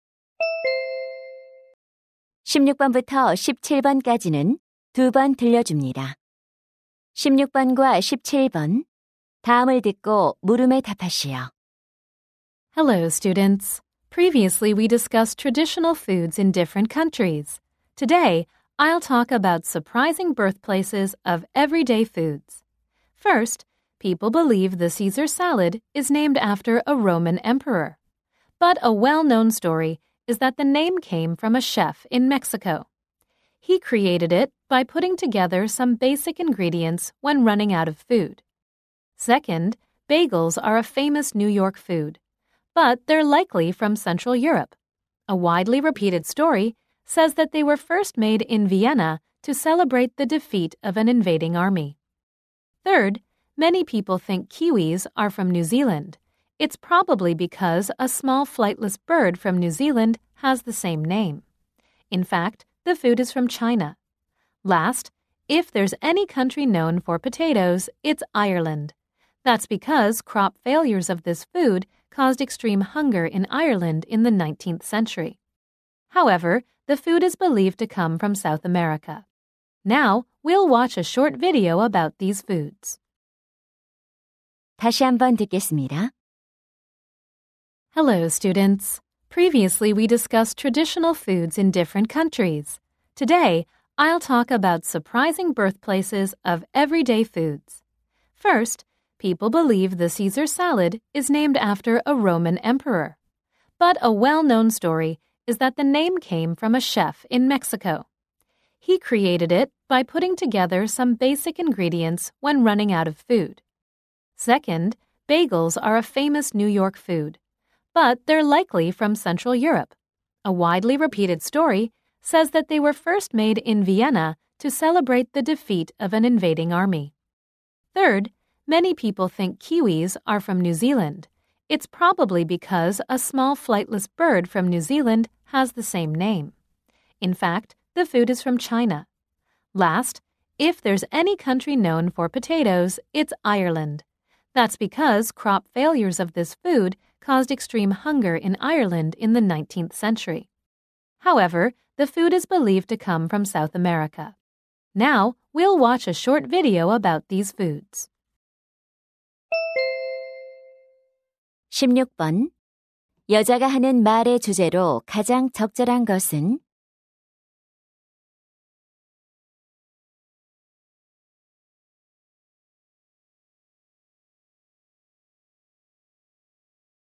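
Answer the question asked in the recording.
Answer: 일상 음식들의 의외의 원산지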